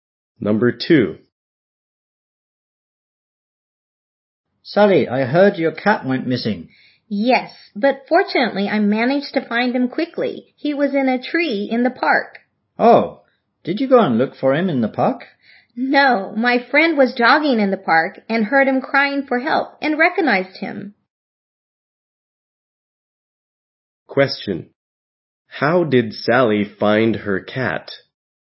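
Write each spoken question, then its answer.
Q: How did Sally find her cat?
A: Her friend heard him crying in a park tree while jogging and recognized him.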